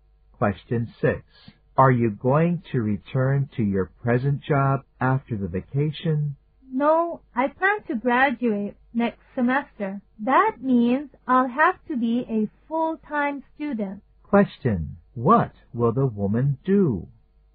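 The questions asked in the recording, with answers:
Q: What will the woman do?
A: Quit her job and study full-time so she can graduate.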